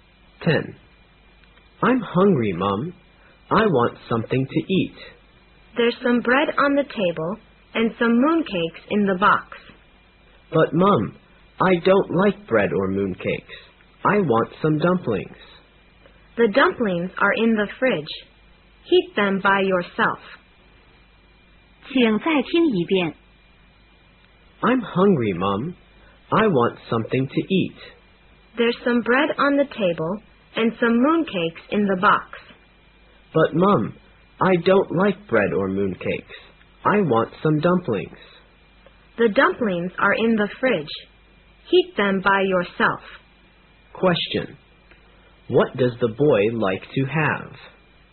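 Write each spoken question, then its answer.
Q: What does the boy like to have?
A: Dumplings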